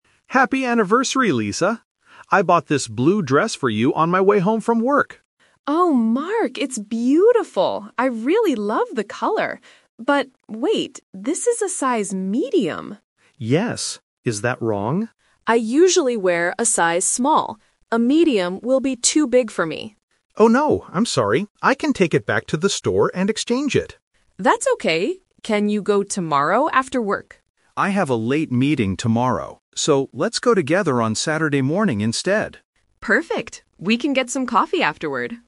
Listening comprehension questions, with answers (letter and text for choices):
Listen to the conversation between a husband and wife. Choose the correct answer (A, B, or C).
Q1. What is the problem with the blue dress?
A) It is the wrong color.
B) It is too big for Lisa.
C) It is too expensive.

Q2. What size does Lisa usually wear?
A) Small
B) Medium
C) Large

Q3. When will they go to the store to exchange the dress?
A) Today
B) Tomorrow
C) On Saturday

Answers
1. B) It is too big for Lisa.
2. A) Small
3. C) On Saturday

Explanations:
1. Lisa says, "A Medium will be too big for me." Option (A) is a trap; Lisa actually says, "I really love the color." Option (C) is a plausible problem for a gift, but it is not mentioned in the audio.
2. Lisa clearly states, "I usually wear a size Small." Option (B) is the trap; Medium is the size of the dress Mark bought, not the size Lisa wears. Option (C) is not mentioned.
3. This question uses the "Twist" technique. Lisa asks if Mark can go "tomorrow" (Option B - the trap). However, Mark changes the plan because he has a meeting, saying, "So, let's go together on Saturday morning instead." Option (A) is the day he gave her the gift, not the day they will exchange it.

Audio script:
Mark: Happy anniversary, Lisa! I bought this blue dress for you on my way home from work.
Lisa: Oh, Mark, it's beautiful! I really love the color. But... wait, this is a size Medium.
Mark: Yes. Is that wrong?
Lisa: I usually wear a size Small. A Medium will be too big for me.
Mark: Oh no, I'm sorry. I can take it back to the store and exchange it.
Lisa: That's okay! Can you go tomorrow after work?
Mark: I have a late meeting tomorrow. So, let's go together on Saturday morning instead.